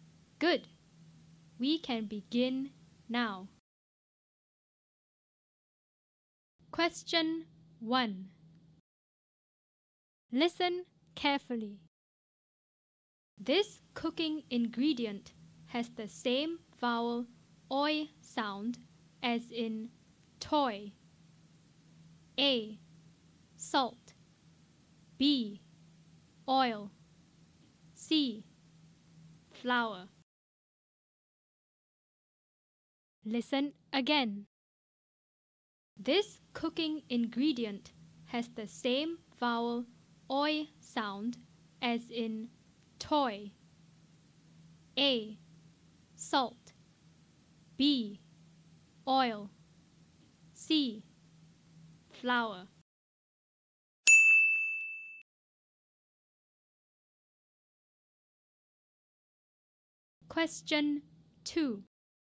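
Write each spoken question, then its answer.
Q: This cooking ingredient has the same vowel oi sound as in toy.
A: B: Oil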